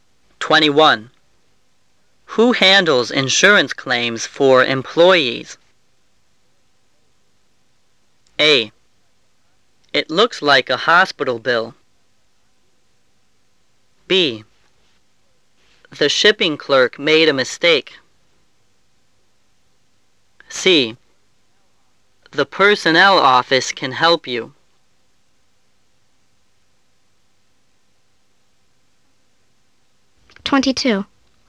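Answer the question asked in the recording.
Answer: C: The personnel office can help you.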